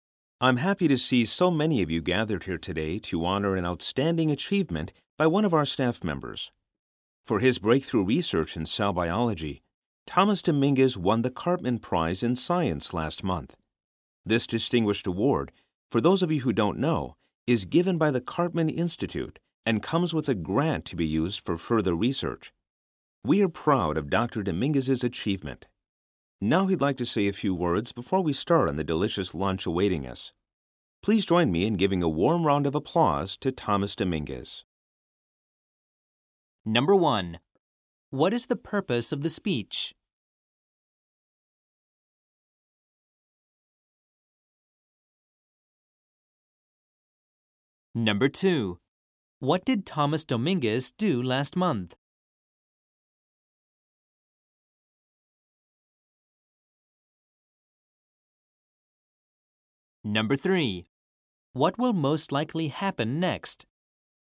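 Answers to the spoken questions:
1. To honor a staff member's achievement
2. He won the Cartman Prize in Science
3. Thomas Dominguez will give a short speech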